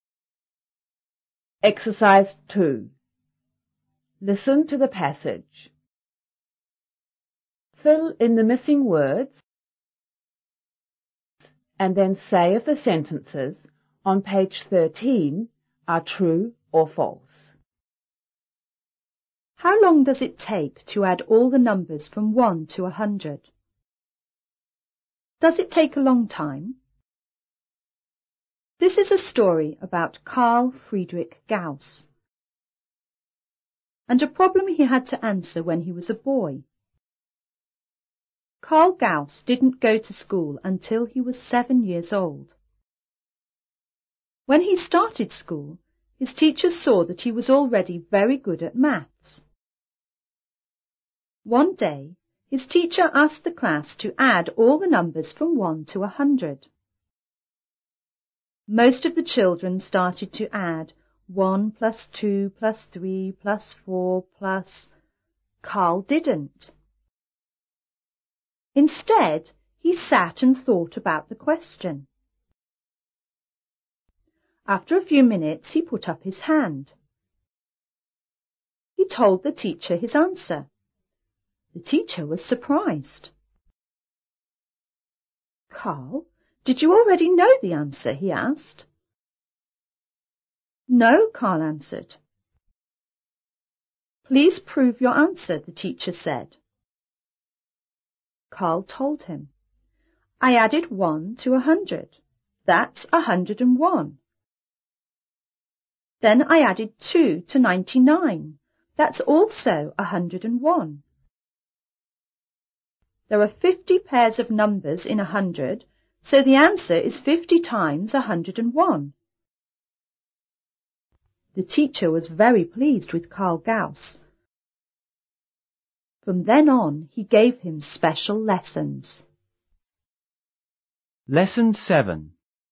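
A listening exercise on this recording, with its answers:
Fill in the missig words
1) and a __ he had to __ when he was a boy.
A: problem; answer

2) Karl Gause didn't go to school _ he was seven years old.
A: until

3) When he started school,his teachers _that he was already very good at maths.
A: saw

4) ___ ,he sat and thought about the question.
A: Instead

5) 'Please __ your answer,'the teacher said.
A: prove

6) The teacher was very __ with Karl Gauss.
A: pleased

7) From then on,he gave him _ _lessons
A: special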